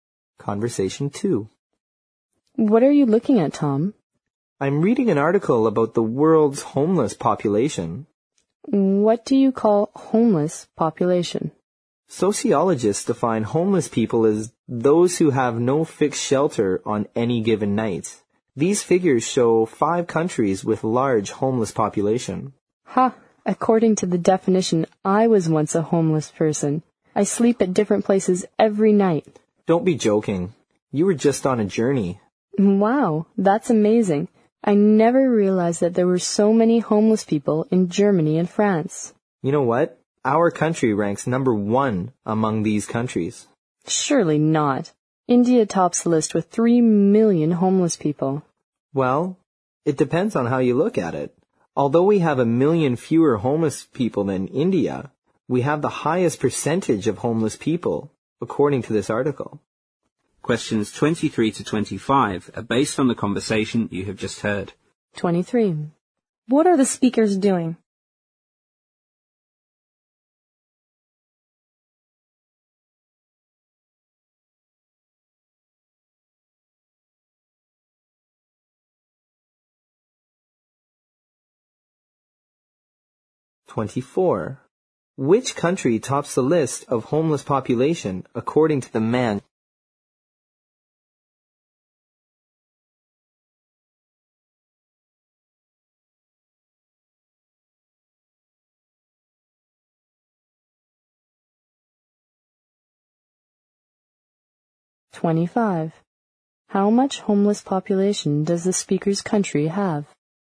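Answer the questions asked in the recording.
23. Discussing an article about the world's homeless population
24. India
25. 2 million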